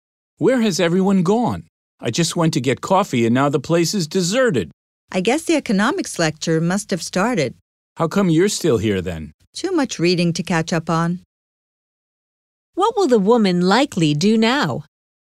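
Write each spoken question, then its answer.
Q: What will the woman likely do now?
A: Stay and catch up on her reading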